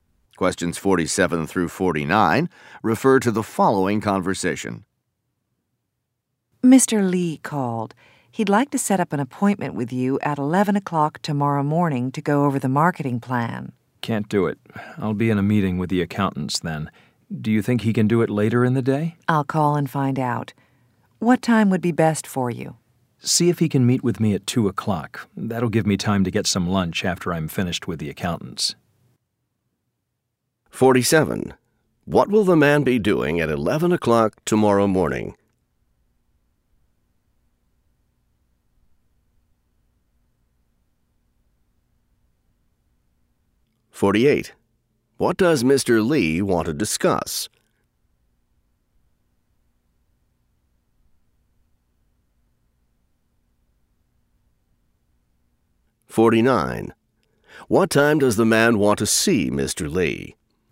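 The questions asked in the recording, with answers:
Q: What will the man be doing at 11 o'clock tomorrow morning?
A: Meeting with the accountants

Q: What does Mr. Lee want to discuss?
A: The marketing plan

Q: What time does the man want to see Mr.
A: At 2 o'clock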